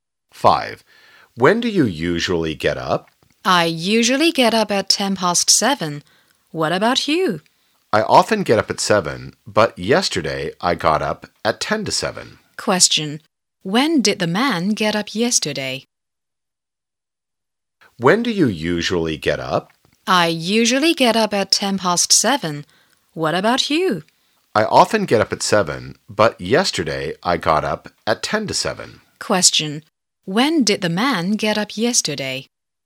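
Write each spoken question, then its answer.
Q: Question. When did the man get up yesterday?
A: At 7:10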